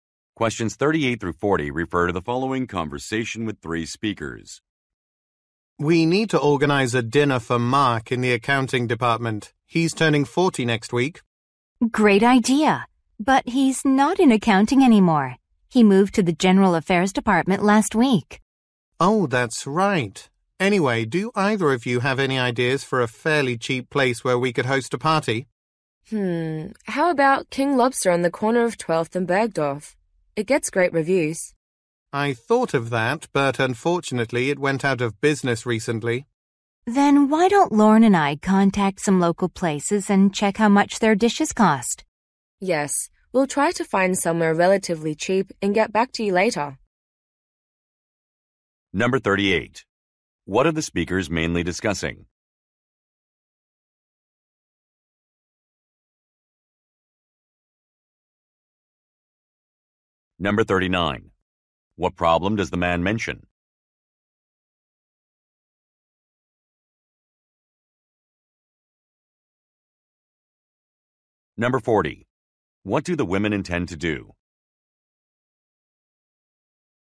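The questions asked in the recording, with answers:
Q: What are the speakers mainly discussing?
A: Organizing a birthday dinner for a coworker

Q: What do the women intend to do?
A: Contact local restaurants to check prices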